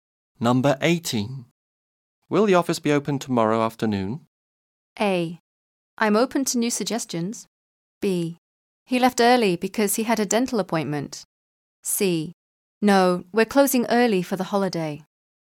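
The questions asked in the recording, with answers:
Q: Will the office be open tomorrow afternoon?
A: C: No, we're closing early for the holiday.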